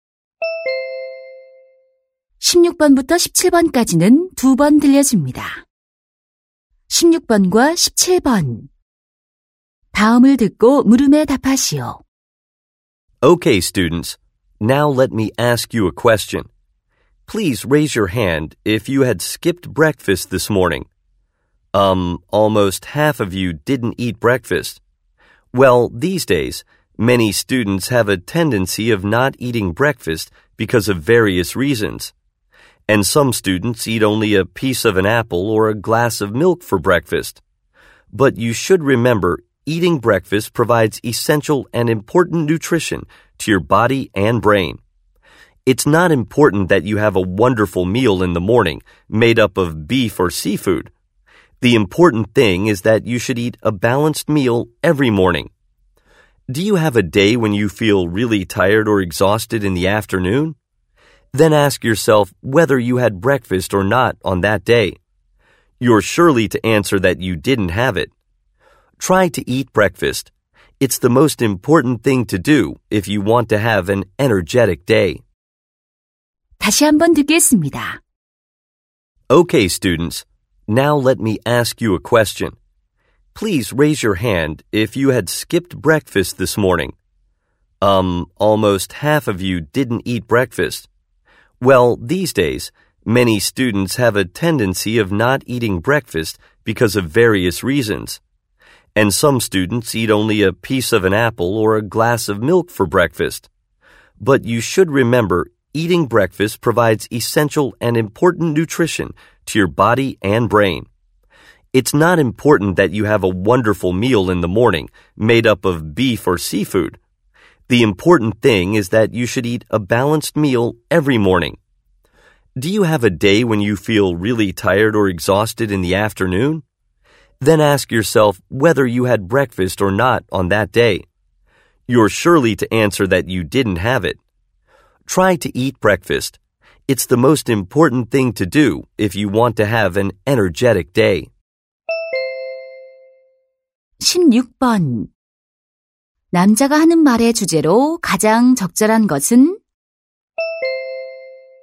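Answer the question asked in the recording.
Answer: 아침 식사의 중요성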